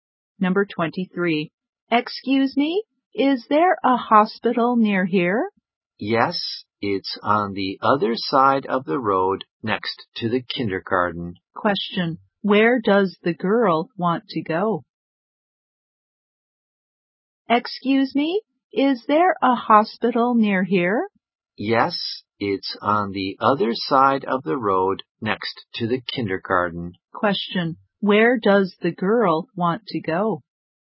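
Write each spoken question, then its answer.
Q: Where does the girl want to go?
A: To the hospital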